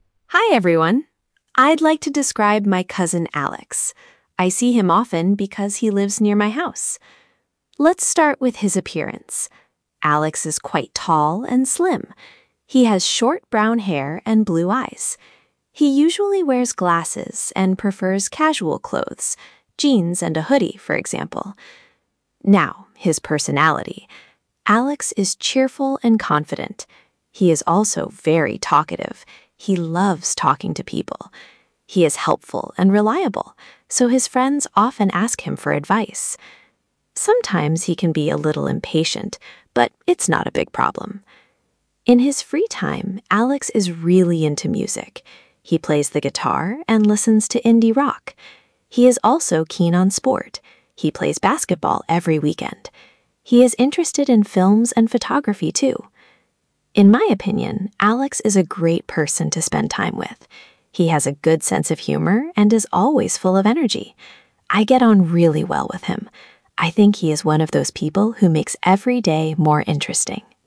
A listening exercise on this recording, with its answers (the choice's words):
Przeczytaj pytania, a potem posłuchaj nagrania i wybierz właściwą odpowiedź.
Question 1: Who is the speaker describing?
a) a best friend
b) a cousin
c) a brother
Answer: a cousin

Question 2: What is the main purpose of the text?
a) to complain about someone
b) to describe someone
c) to compare two people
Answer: to describe someone

Wysłuchaj nagrania i zaznacz T (True) lub F (False):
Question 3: Alex is quite tall and has long brown hair.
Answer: False

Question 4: He usually wears smart / formal clothes.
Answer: False

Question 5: Alex is friendly but very shy.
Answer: False

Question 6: He helps his friends and they trust him.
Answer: True

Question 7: He is keen on basketball and plays it regularly.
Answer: True

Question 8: The speaker thinks Alex makes every day more interesting.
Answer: True

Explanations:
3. he has short brown hair.
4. he prefers casual clothes (jeans and a hoodie).
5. he is confident and talkative.
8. "he is one of those people who makes every day more interesting."

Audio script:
Hi, everyone. I'd like to describe my cousin Alex. I see him often because he lives near my house.
Let's start with his appearance. Alex is quite tall and slim. He has short brown hair and blue eyes. He usually wears glasses and prefers casual clothes — jeans and a hoodie, for example.
Now, his personality. Alex is cheerful and confident. He is also very talkative — he loves talking to people. He is helpful and reliable, so his friends often ask him for advice. Sometimes he can be a little impatient, but it's not a big problem.
In his free time, Alex is really into music. He plays the guitar and listens to indie rock. He is also keen on sport — he plays basketball every weekend. He is interested in films and photography too.
In my opinion, Alex is a great person to spend time with. He has a good sense of humour and is always full of energy. I get on really well with him. I think he is one of those people who makes every day more interesting.

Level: A2+/B1